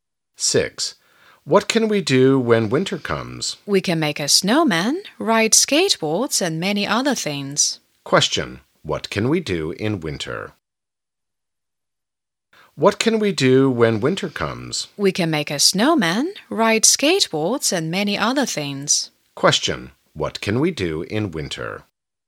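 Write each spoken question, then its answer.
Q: Question: what can we do in winter?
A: Make a snowman and ride skateboards.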